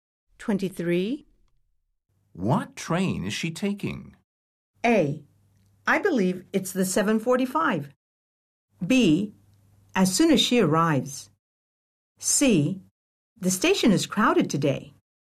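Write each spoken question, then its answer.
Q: What train is she taking?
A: A: I believe it's the 7:45.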